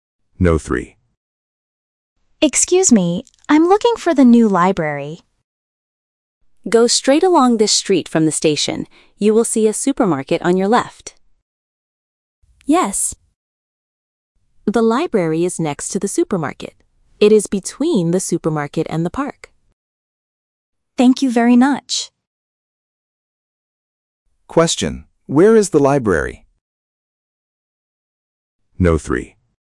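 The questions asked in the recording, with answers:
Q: Where is the library?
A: Between the supermarket and the park.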